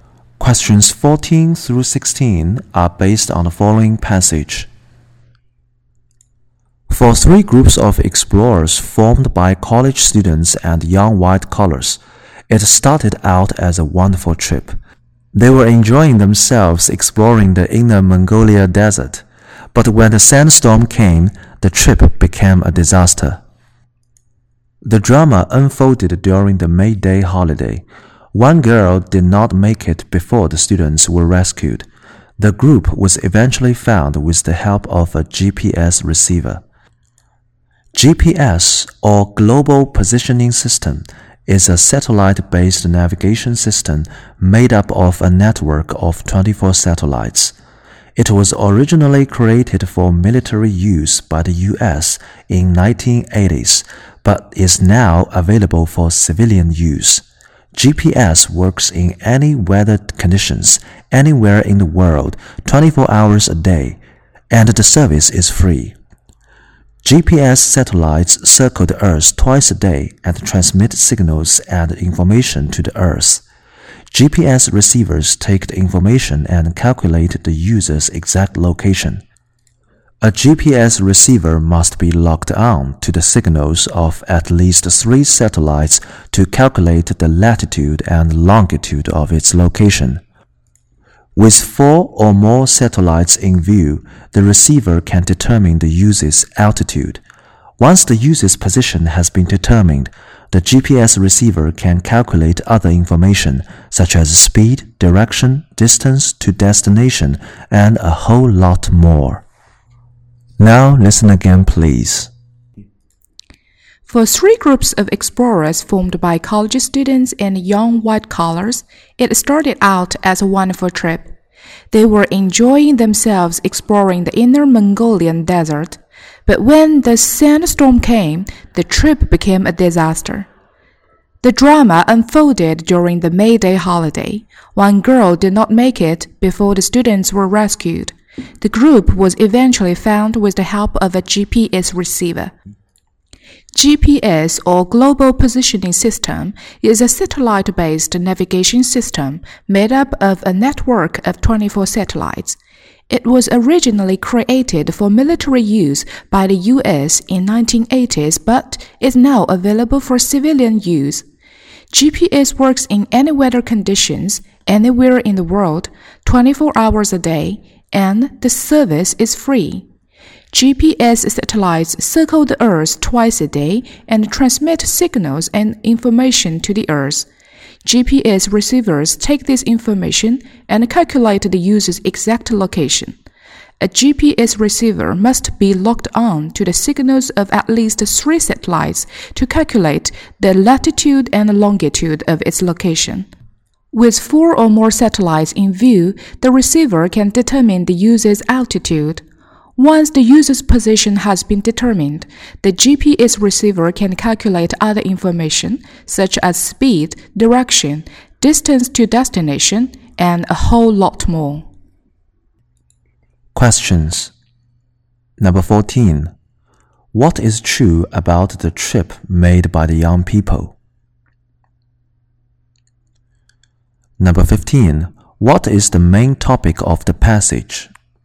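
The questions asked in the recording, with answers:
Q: What is the main topic of the passage?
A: GPS (Global Positioning System)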